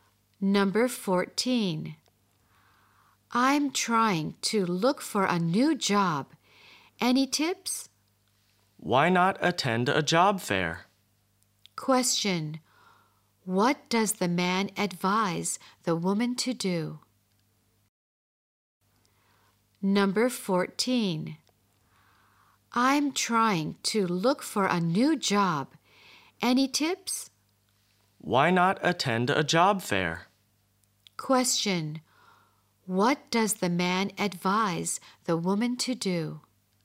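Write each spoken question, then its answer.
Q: What does the man advise the woman to do?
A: Attend a job fair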